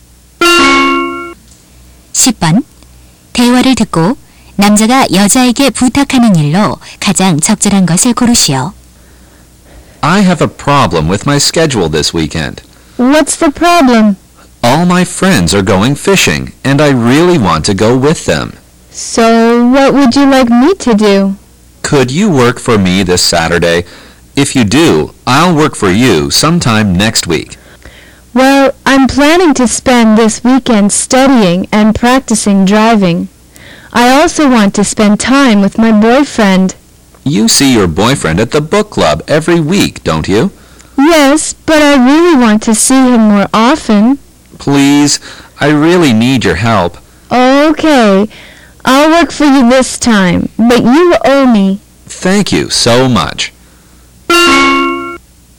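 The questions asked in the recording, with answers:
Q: 대화를 듣고 남자가 여자에게 부탁하는 일로 가장 적절한 것을 고르시오.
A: 이번 토요일에 대신 일해 주기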